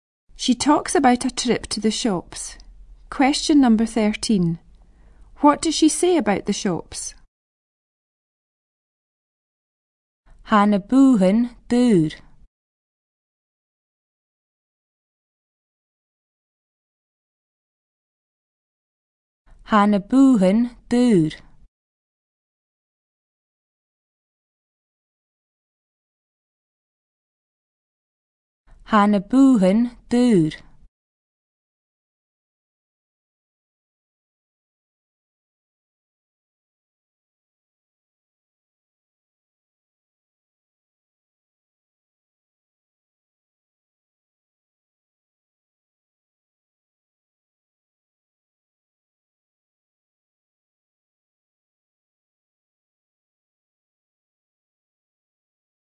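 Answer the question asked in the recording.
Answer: They were expensive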